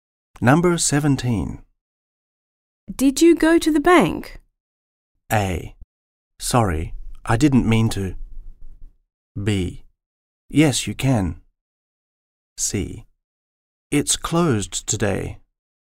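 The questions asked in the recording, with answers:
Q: Did you go to the bank?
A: C: It's closed today.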